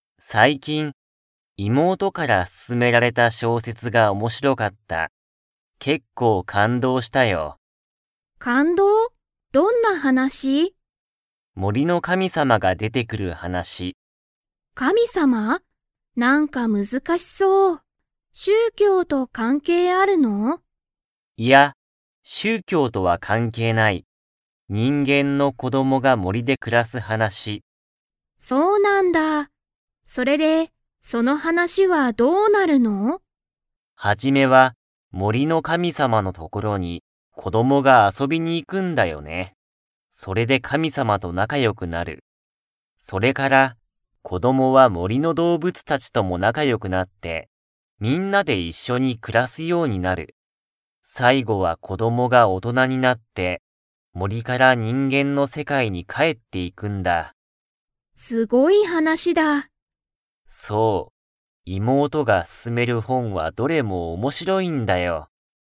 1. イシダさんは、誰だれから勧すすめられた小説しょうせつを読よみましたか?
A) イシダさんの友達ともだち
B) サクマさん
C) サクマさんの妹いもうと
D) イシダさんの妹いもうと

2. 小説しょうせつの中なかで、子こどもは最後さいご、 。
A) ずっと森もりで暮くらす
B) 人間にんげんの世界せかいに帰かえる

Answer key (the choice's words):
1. イシダさんの妹いもうと
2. 人間にんげんの世界せかいに帰かえる

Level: Level 4